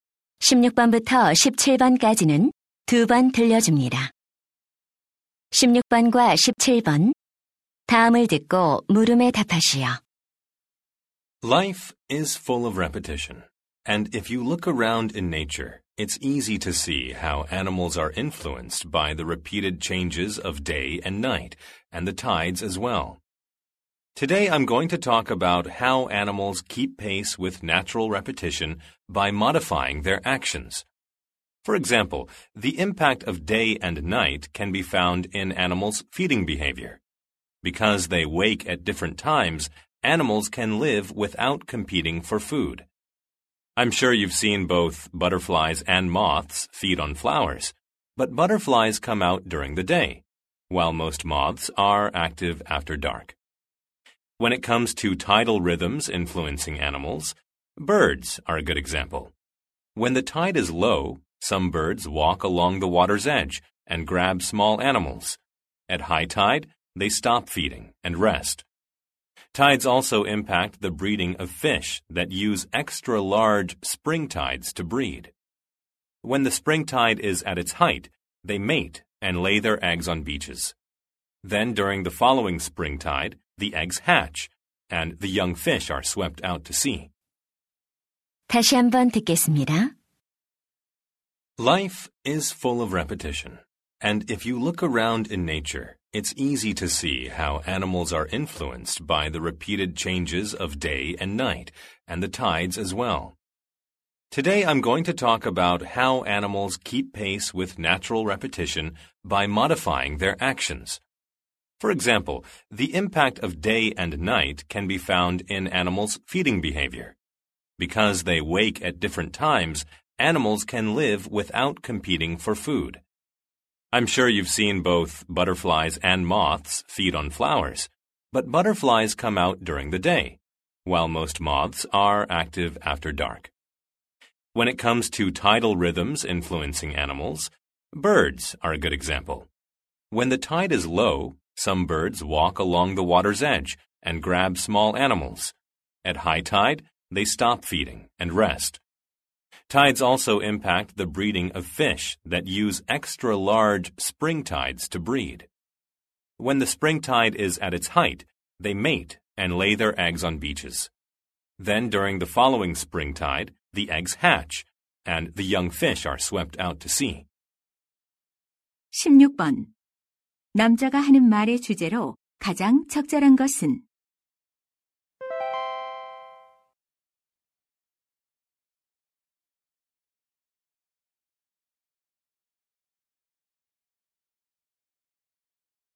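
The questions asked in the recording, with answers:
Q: 남자가 하는 말의 주제로 가장 적절한 것은?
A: 동물들이 자연의 반복(낮과 밤, 조수)에 맞춰 행동을 조절하는 방식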